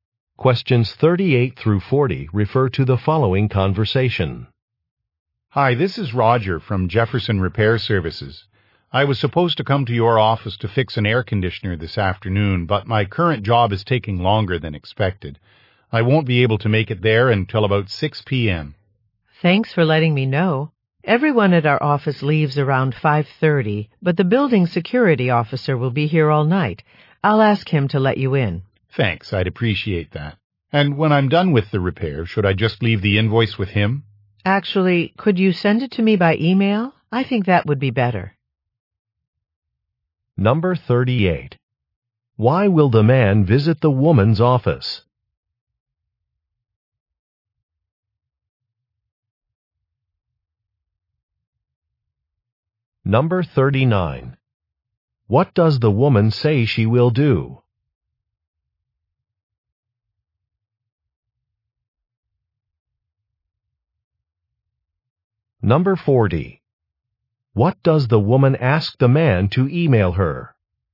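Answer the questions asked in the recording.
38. To fix an air conditioner
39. Ask the security officer to let him in
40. The invoice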